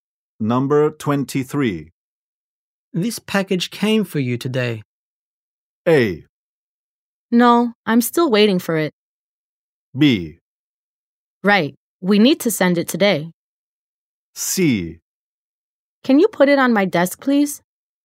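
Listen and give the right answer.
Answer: C: Can you put it on my desk, please?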